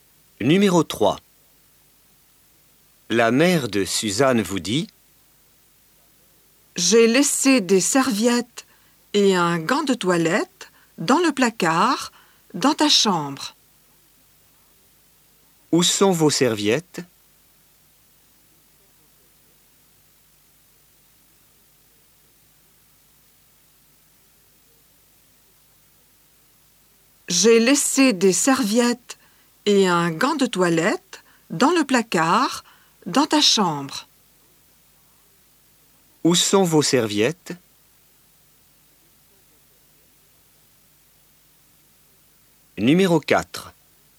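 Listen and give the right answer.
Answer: Dans le placard, dans la chambre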